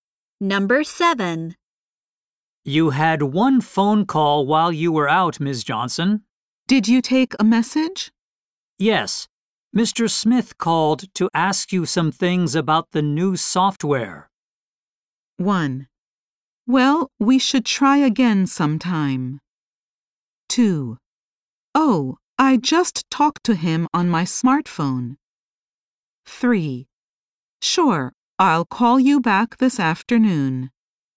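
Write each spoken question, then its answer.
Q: Yes. Mr. Smith called to ask you some things about the new software.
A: 2: Oh, I just talked to him on my smartphone.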